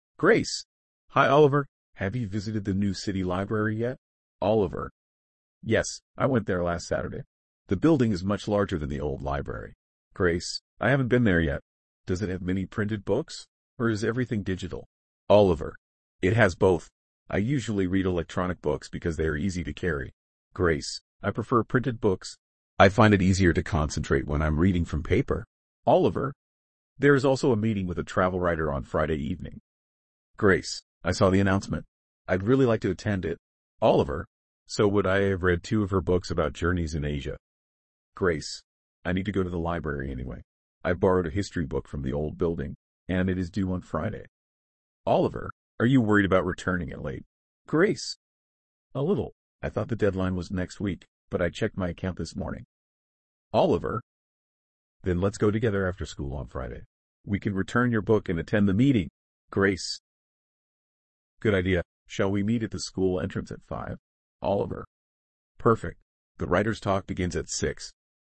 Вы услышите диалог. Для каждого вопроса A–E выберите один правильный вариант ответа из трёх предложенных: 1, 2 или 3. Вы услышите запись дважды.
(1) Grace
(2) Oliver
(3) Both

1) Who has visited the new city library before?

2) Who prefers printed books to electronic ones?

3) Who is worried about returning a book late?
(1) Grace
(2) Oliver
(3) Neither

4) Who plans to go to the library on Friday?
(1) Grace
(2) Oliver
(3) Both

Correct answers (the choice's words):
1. Oliver
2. Grace
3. Grace
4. Both

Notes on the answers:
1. Только Оливер уже был в новой городской библиотеке: он посетил её в прошлую субботу.
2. Грейс говорит, что предпочитает печатные книги. Оливер обычно читает электронные книги.
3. Грейс переживает, что может вернуть историческую книгу позже установленного срока.
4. Грейс и Оливер договариваются вместе пойти в библиотеку после школы в пятницу.

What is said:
Grace: Hi Oliver! Have you visited the new city library yet?
Oliver: Yes, I went there last Saturday. The building is much larger than the old library.
Grace: I haven't been there yet. Does it have many printed books, or is everything digital?
Oliver: It has both. I usually read electronic books because they are easy to carry.
Grace: I prefer printed books. I find it easier to concentrate when I'm reading from paper.
Oliver: There is also a meeting with a travel writer on Friday evening.
Grace: I saw the announcement. I'd really like to attend it.
Oliver: So would I. I have read two of her books about journeys in Asia.
Grace: I need to go to the library anyway. I borrowed a history book from the old building, and it is due on Friday.
Oliver: Are you worried about returning it late?
Grace: A little. I thought the deadline was next week, but I checked my account this morning.
Oliver: Then let's go together after school on Friday. We can return your book and attend the meeting.
Grace: Good idea. Shall we meet at the school entrance at five?
Oliver: Perfect. The writer's talk begins at six.

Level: 10 класса